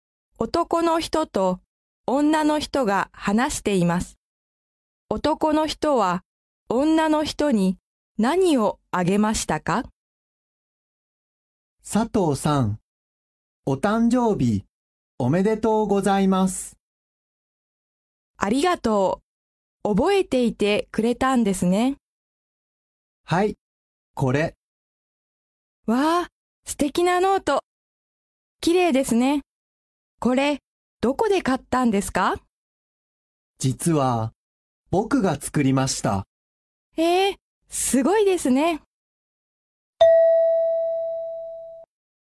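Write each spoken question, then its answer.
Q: 男の人は、女の人に何をあげましたか?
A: ノート(男の人が作ったもの)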